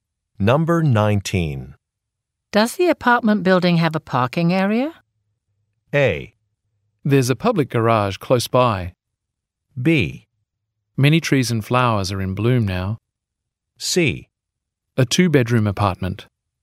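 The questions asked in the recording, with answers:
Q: Does the apartment building have a parking area?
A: A: There's a public garage close by.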